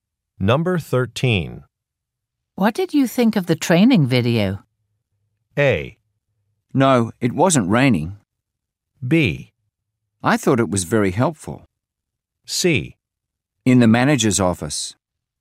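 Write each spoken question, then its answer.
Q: What did you think of the training video?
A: B: I thought it was very helpful.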